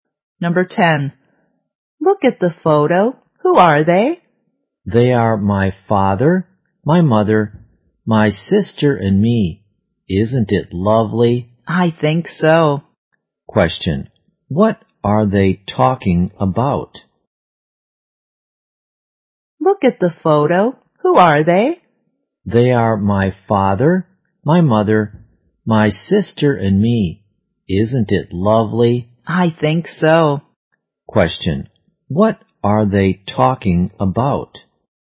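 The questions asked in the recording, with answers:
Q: What are they talking about?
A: A family photo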